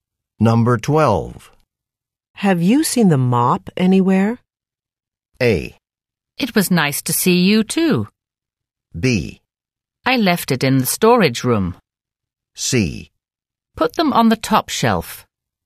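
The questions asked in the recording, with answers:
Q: Have you seen the mop anywhere?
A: B: I left it in the storage room.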